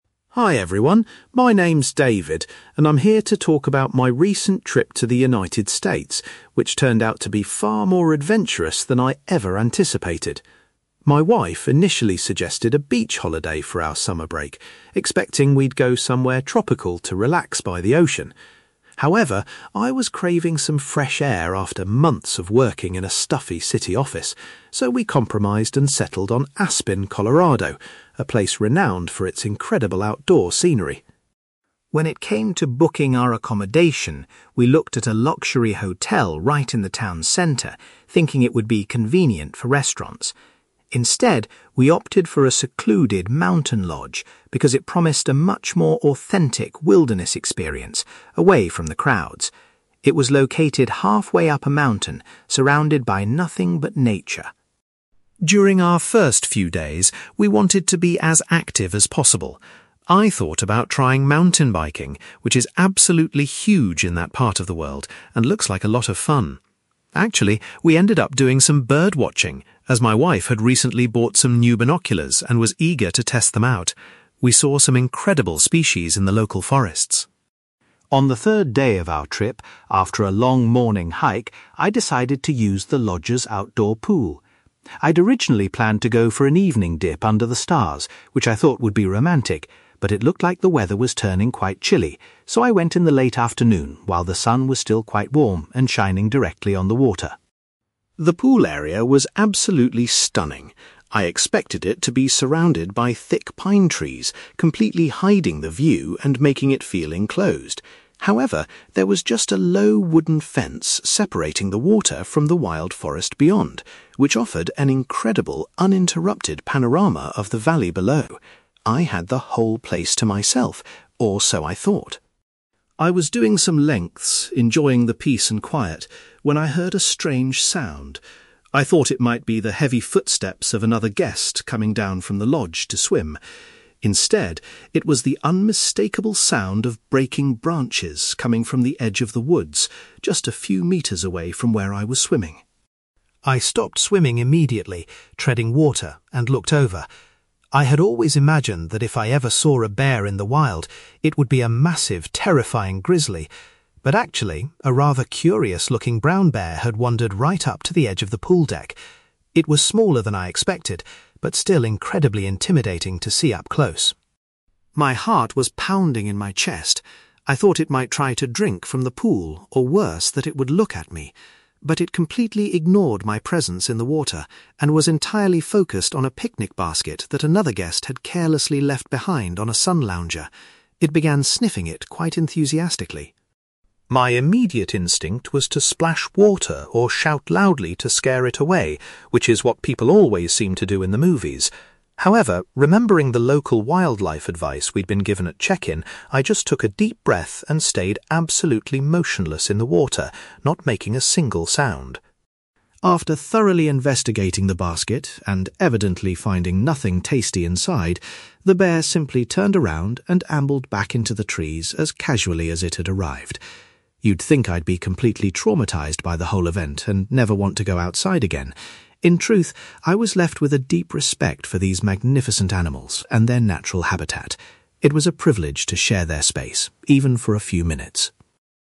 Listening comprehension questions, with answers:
You will hear a tourist called David giving a talk about a holiday to Aspen where he had a surprising encounter with a bear. For questions 9-18, complete the sentences with a word or short phrase.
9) David's wife originally wanted a beach holiday, but they chose Aspen because David wanted to enjoy some (9)........................... .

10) Rather than staying in the centre of town, David and his wife booked a (10)........................... for their trip.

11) Before the bear encounter, David spent time doing some (11)........................... with his wife.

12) David decided to go for a swim in the (12)........................... rather than later in the evening.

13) The swimming pool was separated from the surrounding wilderness by a small (13)........................... .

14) David's attention was drawn to the edge of the forest by the noise of (14)........................... .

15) David was surprised to see a wandering (15)........................... approach the pool deck.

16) The bear ignored the swimming pool and went straight towards a (16)........................... left on a chair.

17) Remembering advice about wildlife, David took a (17)........................... and remained completely still.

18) Looking back on the event, David feels a (18)........................... for the wild animals.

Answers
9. fresh air
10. mountain lodge
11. bird watching
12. late afternoon
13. wooden fence
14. breaking branches
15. brown bear
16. picnic basket
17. deep breath
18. deep respect

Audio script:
David: Hi everyone, my name is David, and I'm here to talk about my recent trip to the United States, which turned out to be far more adventurous than I ever anticipated. My wife initially suggested a beach holiday for our summer break, expecting we'd go somewhere tropical to relax by the ocean. However, I was craving some fresh air after months of working in a stuffy city office, so we compromised and settled on Aspen, Colorado, a place renowned for its incredible outdoor scenery.
When it came to booking our accommodation, we looked at a luxury hotel right in the town centre, thinking it would be convenient for restaurants. Instead, we opted for a secluded mountain lodge because it promised a much more authentic wilderness experience, away from the crowds. It was located halfway up a mountain, surrounded by nothing but nature.
During our first few days, we wanted to be as active as possible. I thought about trying mountain biking, which is absolutely huge in that part of the world and looks like a lot of fun. Actually, we ended up doing some bird watching as my wife had recently bought some new binoculars and was eager to test them out. We saw some incredible species in the local forests.
On the third day of our trip, after a long morning hike, I decided to use the lodge's outdoor pool. I'd originally planned to go for an evening dip under the stars, which I thought would be romantic. But it looked like the weather was turning quite chilly, so I went in the late afternoon while the sun was still quite warm and shining directly on the water.
The pool area was absolutely stunning. I expected it to be surrounded by thick pine trees, completely hiding the view and making it feel enclosed. However, there was just a low wooden fence separating the water from the wild forest beyond, which offered an incredible, uninterrupted panorama of the valley below. I had the whole place to myself, or so I thought.
I was doing some lengths, enjoying the peace and quiet, when I heard a strange sound. I thought it might be the heavy footsteps of another guest coming down from the lodge to swim. Instead, it was the unmistakable sound of breaking branches coming from the edge of the woods, just a few metres away from where I was swimming.
I stopped swimming immediately, treading water, and looked over. I had always imagined that if I ever saw a bear in the wild, it would be a massive, terrifying grizzly. But actually, a rather curious-looking brown bear had wandered right up to the edge of the pool deck. It was smaller than I expected, but still incredibly intimidating to see up close.
My heart was pounding in my chest. I thought it might try to drink from the pool, or worse, that it would look at me. But it completely ignored my presence in the water and was entirely focused on a picnic basket that another guest had carelessly left behind on a sun lounger. It began sniffing it quite enthusiastically.
My immediate instinct was to splash water or shout loudly to scare it away, which is what people always seem to do in the movies. However, remembering the local wildlife advice we'd been given at check-in, I just took a deep breath and stayed absolutely motionless in the water, not making a single sound.
After thoroughly investigating the basket and evidently finding nothing tasty inside, the bear simply turned around and ambled back into the trees as casually as it had arrived. You'd think I'd be completely traumatised by the whole event and never want to go outside again. In truth, I was left with a deep respect for these magnificent animals and their natural habitat. It was a privilege to share their space, even for a few minutes.

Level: B2